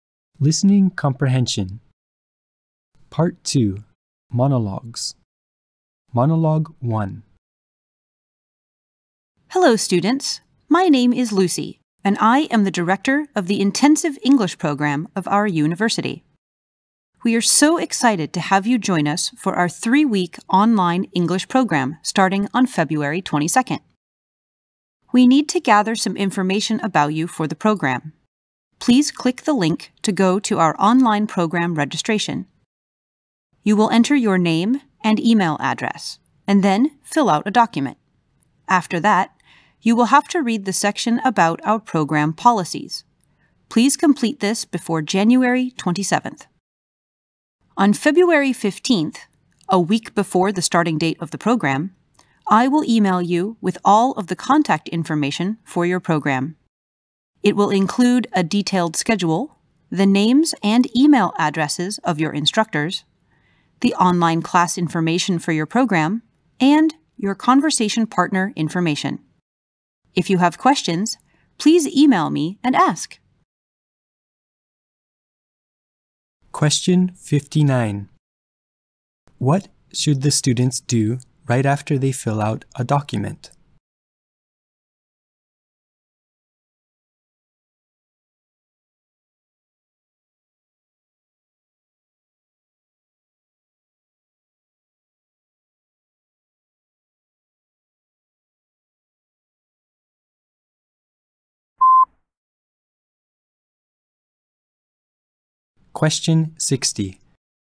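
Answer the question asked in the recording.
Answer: Read the section about the program policies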